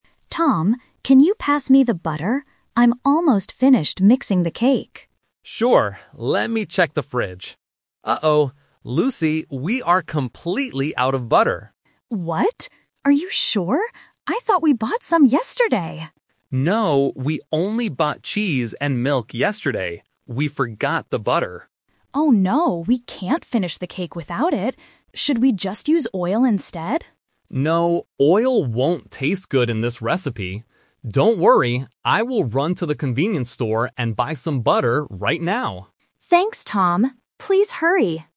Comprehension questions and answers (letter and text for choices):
Listen to the conversation between a brother and sister, and choose the correct answer (A, B, or C) for each question.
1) What ingredient is missing from the fridge?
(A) Cheese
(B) Butter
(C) Milk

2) What does Lucy suggest they use instead of butter?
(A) Oil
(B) Milk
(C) Cheese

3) What is Tom going to do next?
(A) Finish mixing the cake.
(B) Use oil for the cake.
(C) Go to the convenience store.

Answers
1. (B) Butter
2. (A) Oil
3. (C) Go to the convenience store.

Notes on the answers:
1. Tom looks in the fridge and says, "we are completely out of butter." Options (A) and (C) are traps; cheese and milk are the items they did buy yesterday, so they are not missing.
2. When Lucy hears there is no butter, she asks, "Should we just use oil instead?" Options (B) and (C) are traps using words mentioned earlier in the conversation, but they are not suggested as a replacement for butter.
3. Tom solves the problem by saying, "I will run to the convenience store and buy some butter right now." Option (A) is a trap; Lucy is the one mixing the cake, not Tom. Option (B) is also a trap; Tom rejects using oil because it "won't taste good."

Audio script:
Lucy: Tom, can you pass me the butter? I'm almost finished mixing the cake.
Tom: Sure. Let me check the fridge... Uh oh. Lucy, we are completely out of butter.
Lucy: What? Are you sure? I thought we bought some yesterday!
Tom: No, we only bought cheese and milk yesterday. We forgot the butter.
Lucy: Oh no, we can't finish the cake without it. Should we just use oil instead?
Tom: No, oil won't taste good in this recipe. Don't worry, I will run to the convenience store and buy some butter right now.